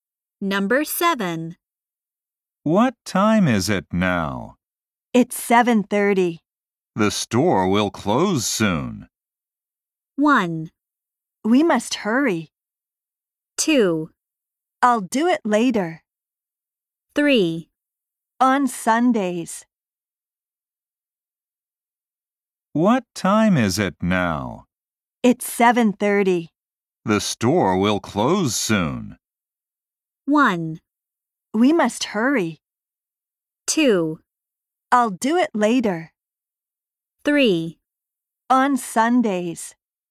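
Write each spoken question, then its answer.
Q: The store will close soon.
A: 1: We must hurry.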